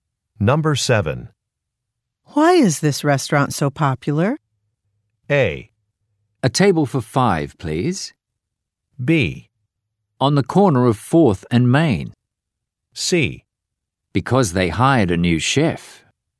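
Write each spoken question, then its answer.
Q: Why is this restaurant so popular?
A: C: Because they hired a new chef.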